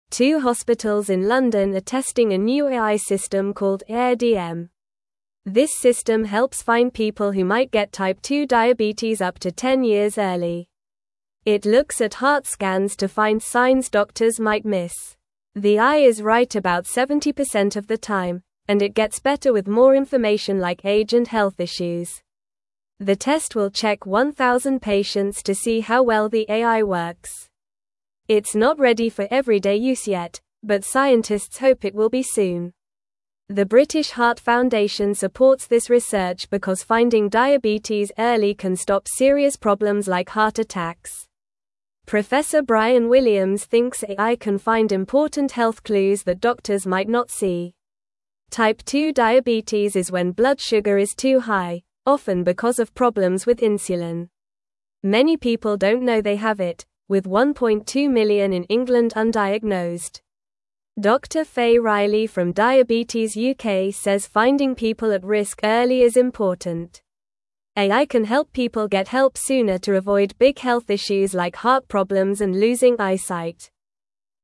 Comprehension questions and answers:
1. Two hospitals in London are testing a new AI (1)______ called Aire-DM.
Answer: system

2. This system helps (2)______ people who might get type 2 diabetes up to ten years early.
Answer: find

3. It looks at heart scans to find signs (3)______ might miss.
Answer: doctors

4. The test will check 1,000 patients to see how well the AI (4)______.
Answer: works

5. It's not ready for everyday use yet, but (5)______ hope it will be soon.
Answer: scientists

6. The British Heart (6)______ supports this research because finding (7)______ early can stop (8)______ problems like heart attacks.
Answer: Foundation

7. The British Heart (6)______ supports this research because finding (7)______ early can stop (8)______ problems like heart attacks.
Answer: diabetes

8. The British Heart (6)______ supports this research because finding (7)______ early can stop (8)______ problems like heart attacks.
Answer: serious

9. Professor Bryan Williams thinks AI can find important (9)______ clues that doctors might not see.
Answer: health

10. Many (10)______ don't know they have it, with 1.2 million in England undiagnosed.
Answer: people

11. Dr. Faye (11)______ from Diabetes UK says finding people at risk early is important.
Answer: Riley

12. AI can help people get help sooner to avoid big health issues like (12)______ problems and losing eyesight.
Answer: heart

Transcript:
Two hospitals in London are testing a new AI system called Aire-DM. This system helps find people who might get type 2 diabetes up to ten years early. It looks at heart scans to find signs doctors might miss. The AI is right about 70% of the time, and it gets better with more information like age and health issues.
The test will check 1,000 patients to see how well the AI works. It's not ready for everyday use yet, but scientists hope it will be soon. The British Heart Foundation supports this research because finding diabetes early can stop serious problems like heart attacks. Professor Bryan Williams thinks AI can find important health clues that doctors might not see.
Type 2 diabetes is when blood sugar is too high, often because of problems with insulin. Many people don't know they have it, with 1.2 million in England undiagnosed. Dr. Faye Riley from Diabetes UK says finding people at risk early is important. AI can help people get help sooner to avoid big health issues like heart problems and losing eyesight.

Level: Level 2